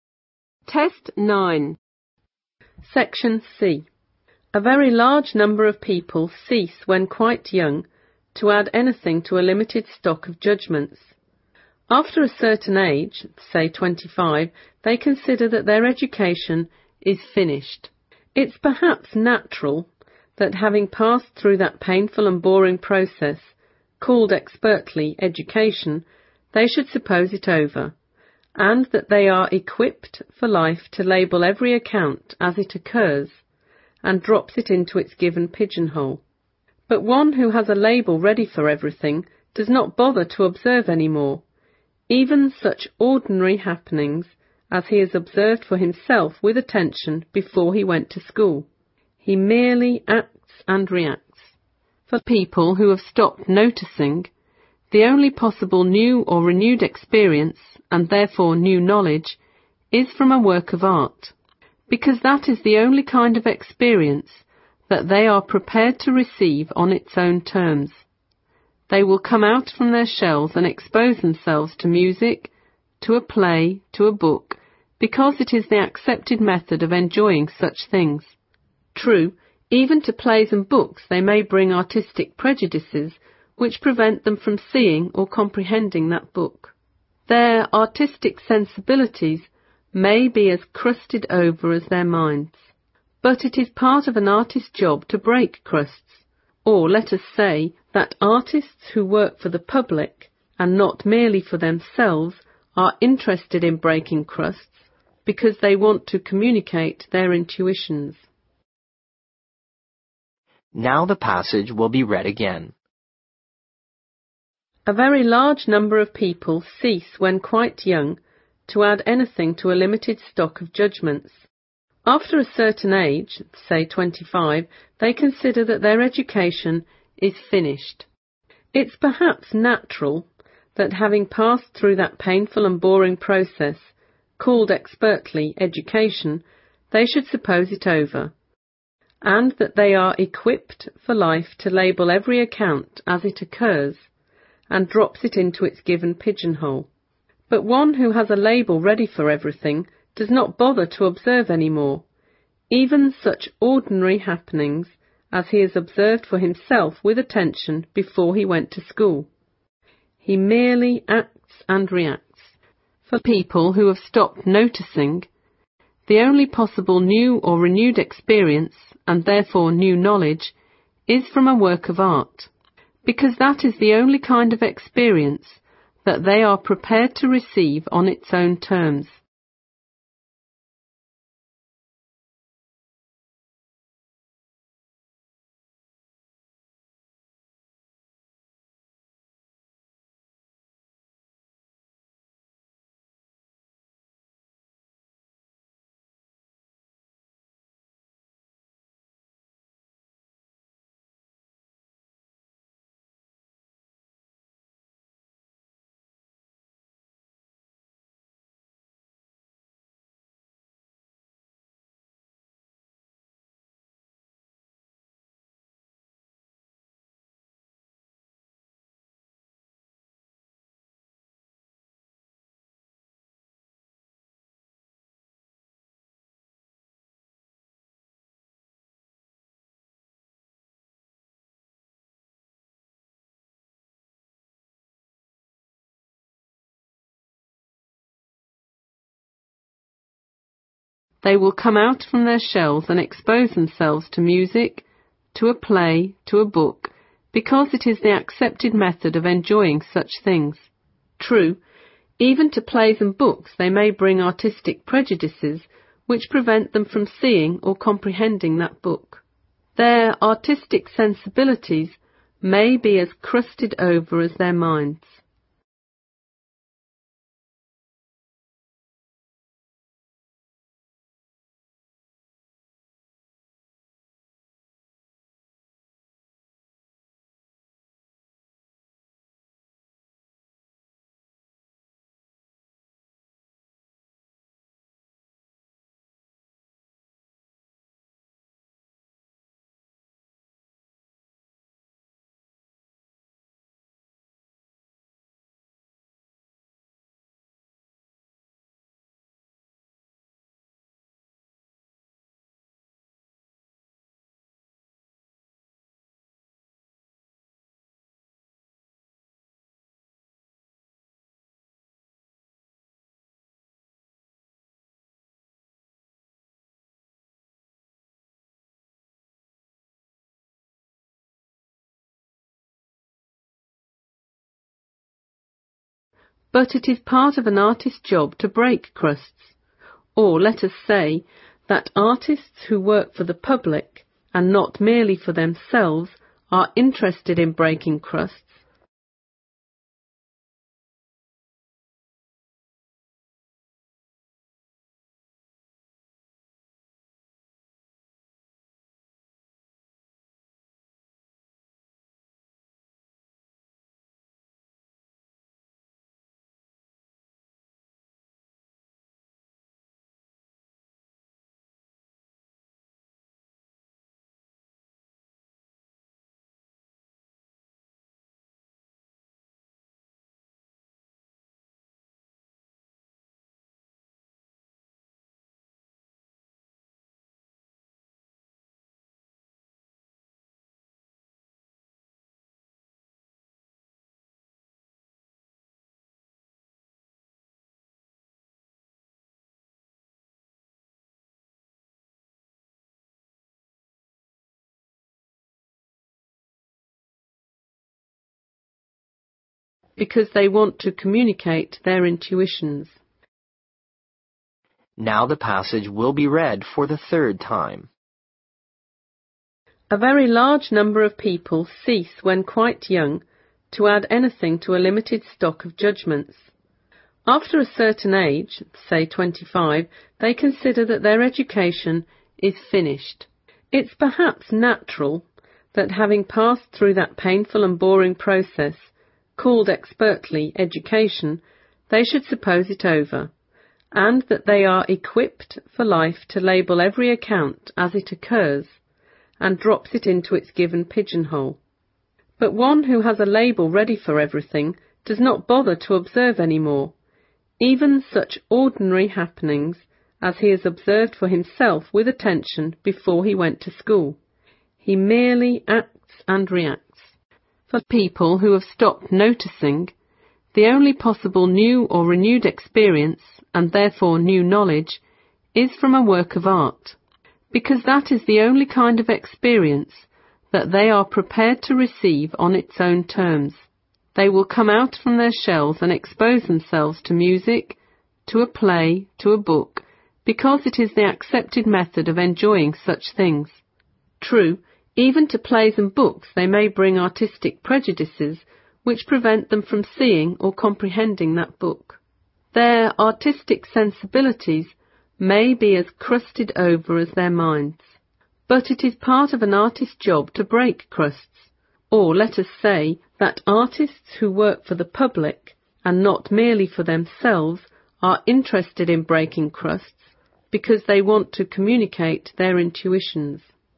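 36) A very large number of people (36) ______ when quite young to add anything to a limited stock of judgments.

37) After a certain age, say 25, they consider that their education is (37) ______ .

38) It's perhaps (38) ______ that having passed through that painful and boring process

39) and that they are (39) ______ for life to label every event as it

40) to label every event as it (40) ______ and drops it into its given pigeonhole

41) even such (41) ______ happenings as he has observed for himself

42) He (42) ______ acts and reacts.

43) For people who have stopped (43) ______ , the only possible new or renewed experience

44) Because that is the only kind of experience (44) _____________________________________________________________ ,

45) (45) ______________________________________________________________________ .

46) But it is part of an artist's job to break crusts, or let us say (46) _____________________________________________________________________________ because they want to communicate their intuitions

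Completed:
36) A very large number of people cease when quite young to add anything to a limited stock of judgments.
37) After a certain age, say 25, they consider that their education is finished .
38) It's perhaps natural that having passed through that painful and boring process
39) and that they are equipped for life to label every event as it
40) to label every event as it occurs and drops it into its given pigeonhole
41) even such ordinary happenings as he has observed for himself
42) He merely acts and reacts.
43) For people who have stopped noticing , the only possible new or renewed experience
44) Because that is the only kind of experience that they are prepared to receive on its own terms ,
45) Their artistic sensibilities may be as crusted over as their minds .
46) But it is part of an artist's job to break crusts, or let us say that artists who work for the public and not merely for themselves are interested in breaking crusts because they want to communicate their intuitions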